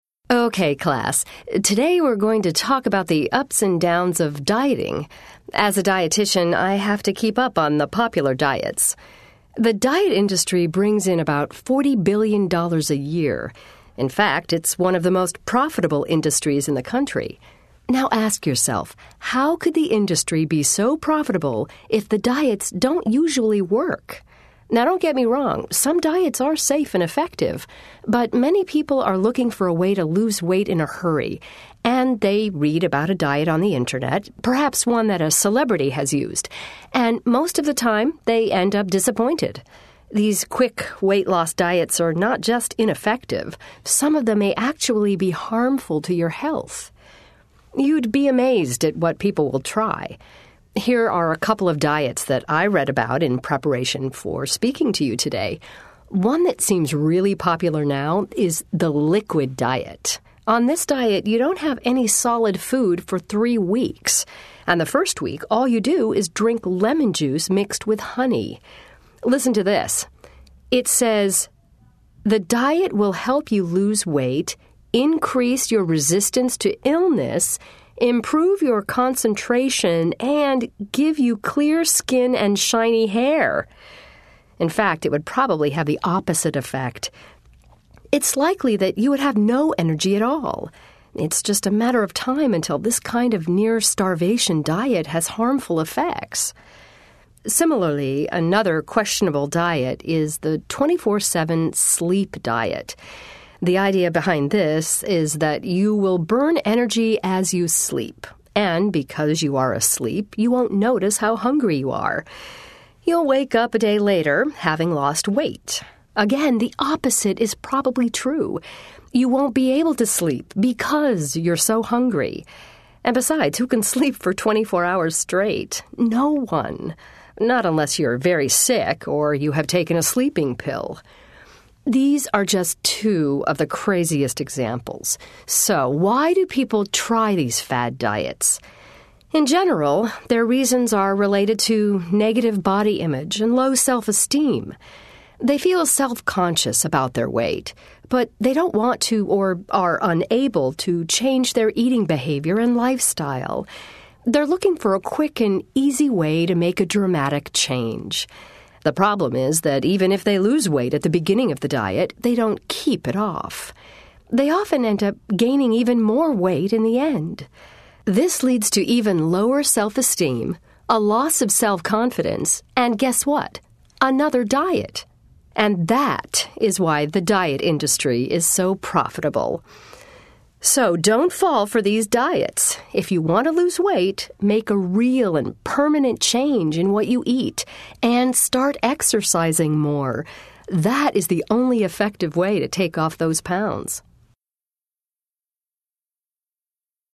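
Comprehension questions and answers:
Listen to the lecture. Then choose the correct answers.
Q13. Why does the professor say the diet industry is so profitable?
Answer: Because diets don't work, so people keep trying another diet.

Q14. According to the lecture, what could be a problem with the liquid diet?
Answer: You would have no energy and it could harm your health.

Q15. What is the main problem with all of these fad diets?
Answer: People don't keep the weight off.

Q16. According to the speaker, what is a negative result of a fad diet?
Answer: Even lower self-esteem and loss of self-confidence.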